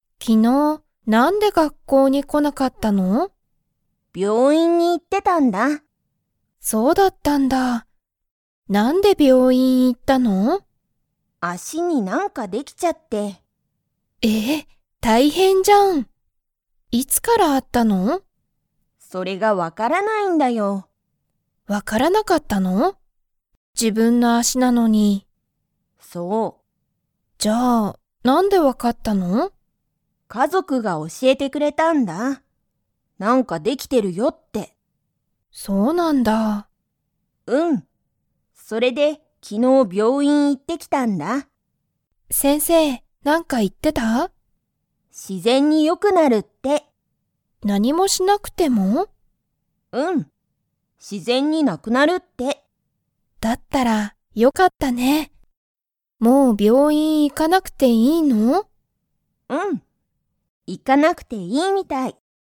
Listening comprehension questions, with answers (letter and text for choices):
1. さゆりは昨日(きのう)、____に行(い)った。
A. 自然(しぜん)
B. 学校(がっこう)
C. 病院(びょういん)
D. お店(みせ)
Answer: C. 病院(びょういん)

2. 先生(せんせい)は、自然(しぜん)によくなると言(い)いましたか?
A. はい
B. いいえ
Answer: A. はい

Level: Level 2